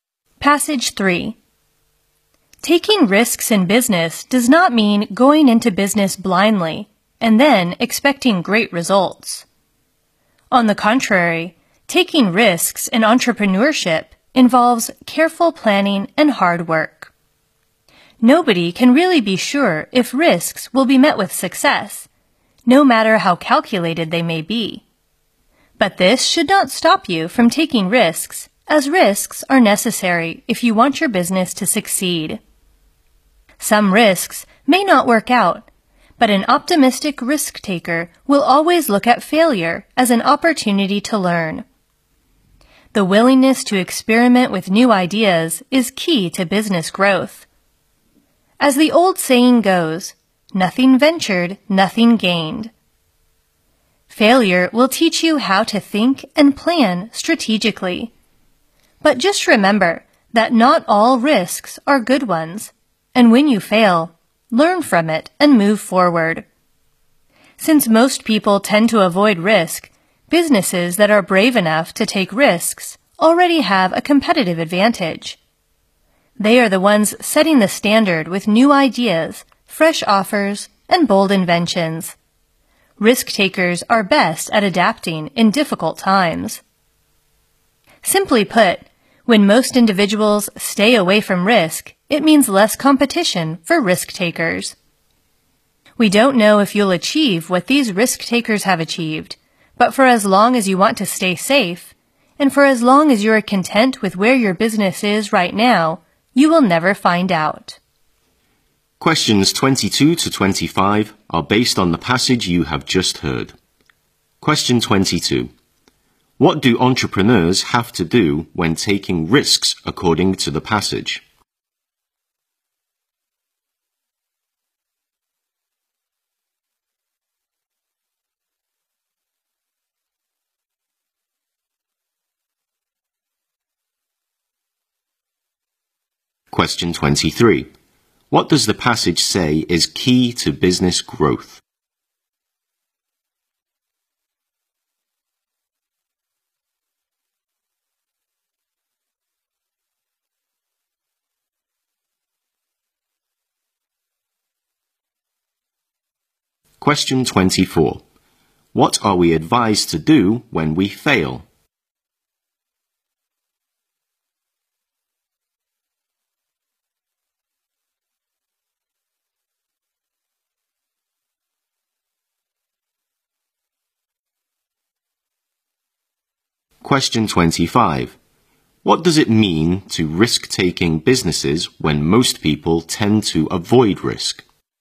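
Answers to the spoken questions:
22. Plan carefully and work hard.
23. Being willing to try new ideas.
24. Learn from it and move forward.
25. Less competition, giving them a competitive advantage.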